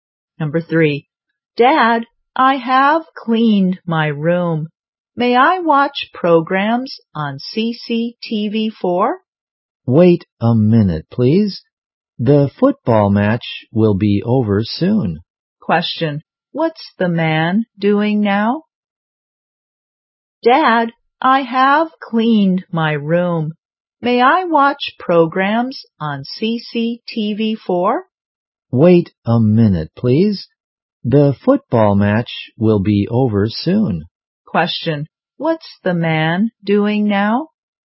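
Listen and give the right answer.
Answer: Watching a football match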